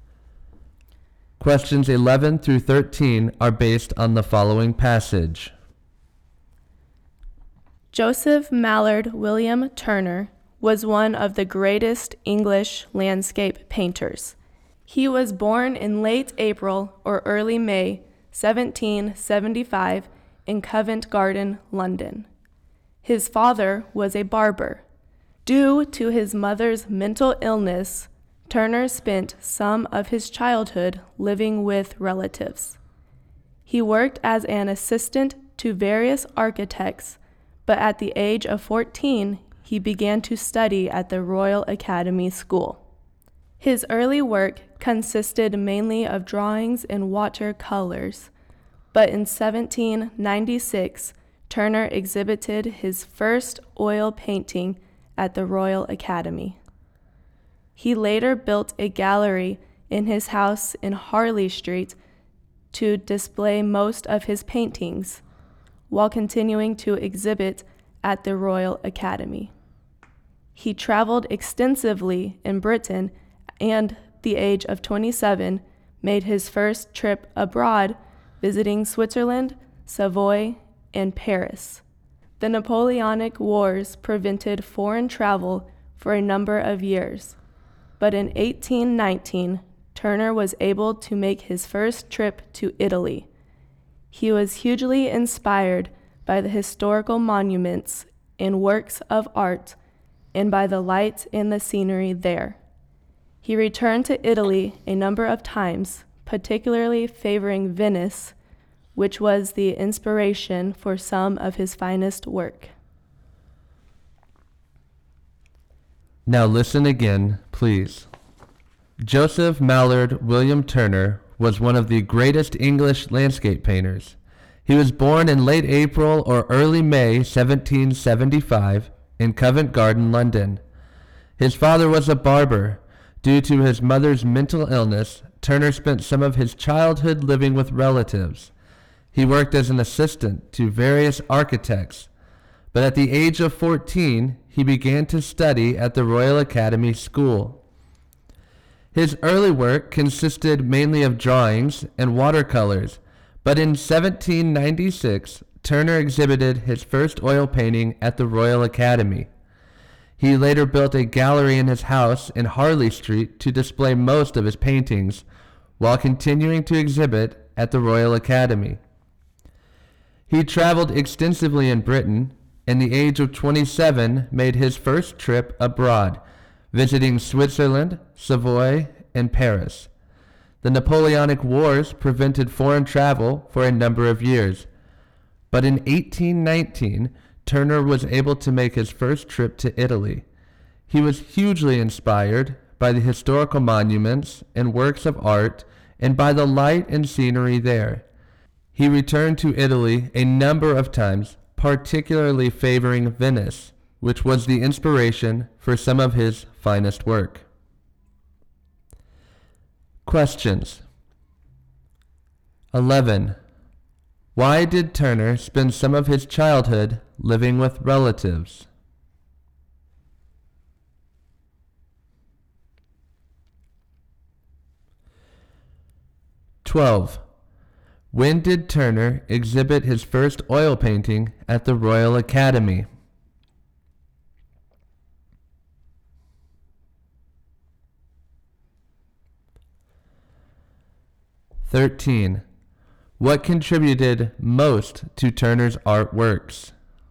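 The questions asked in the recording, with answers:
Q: Why did Turner spend some of his childhood living with relatives?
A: Because of his mother's mental illness

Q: When did Turner exhibit his first oil painting at the Royal Academy?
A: In 1796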